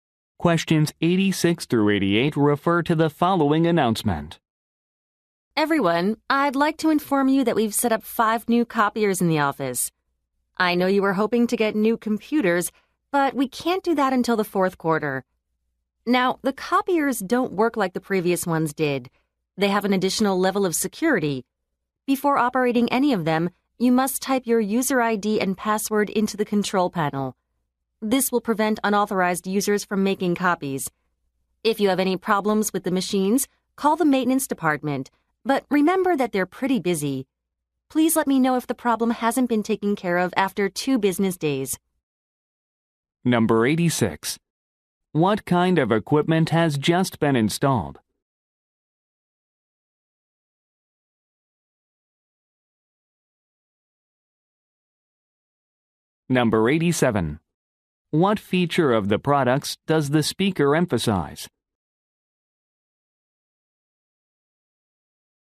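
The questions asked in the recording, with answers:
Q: What kind of equipment has just been installed?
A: Copiers

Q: What feature of the products does the speaker emphasize?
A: Extra security (user ID and password)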